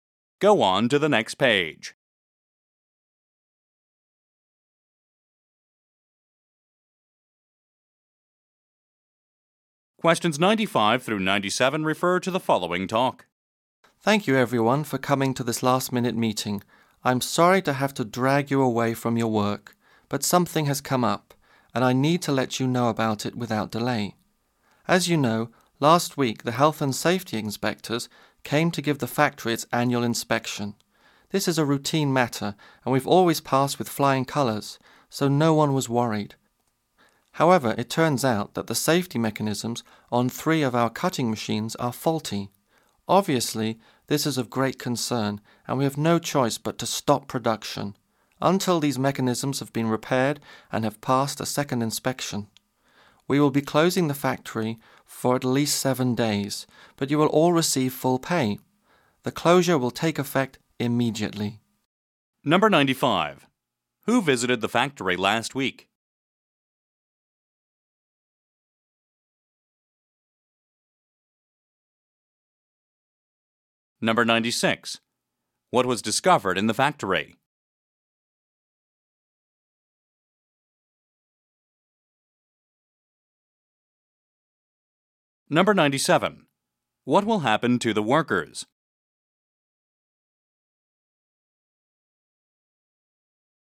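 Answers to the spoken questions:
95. Health and safety inspectors
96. Faulty safety mechanisms on three cutting machines
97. They will get at least 7 days off with full pay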